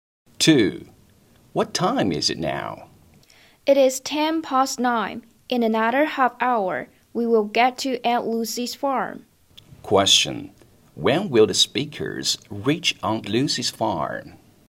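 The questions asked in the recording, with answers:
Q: When will the speakers reach Aunt Lucy's farm?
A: At 9:40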